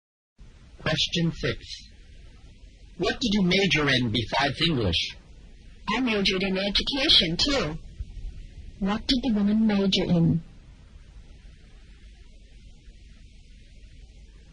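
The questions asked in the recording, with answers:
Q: What did the woman major in?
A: English and education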